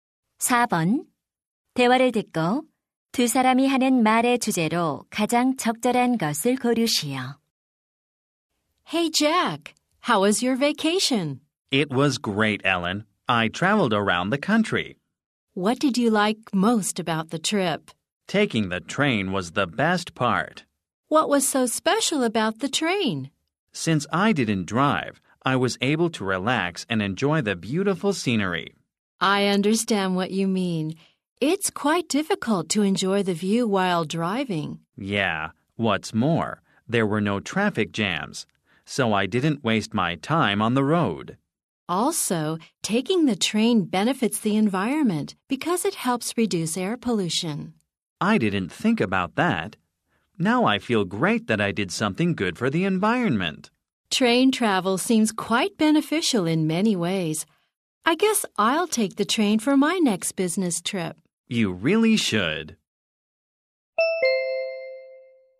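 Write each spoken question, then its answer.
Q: 대화를 듣고 두 사람이 하는 말의 주제로 가장 적절한 것을 고르시오.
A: 기차 여행의 장점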